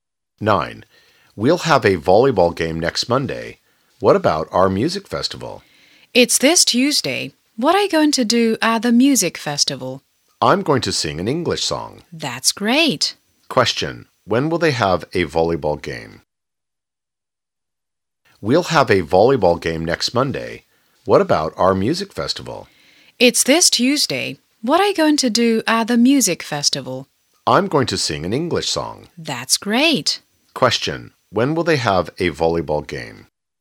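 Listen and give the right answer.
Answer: Next Monday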